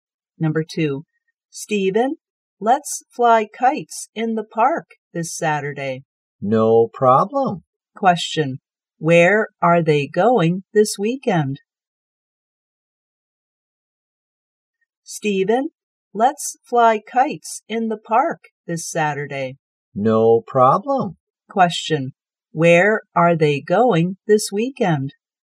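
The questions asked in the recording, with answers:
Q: Question, where are they going this weekend?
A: To the park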